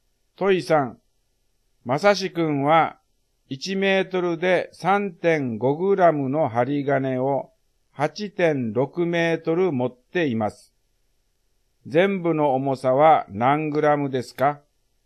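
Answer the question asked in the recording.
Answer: 30.1グラム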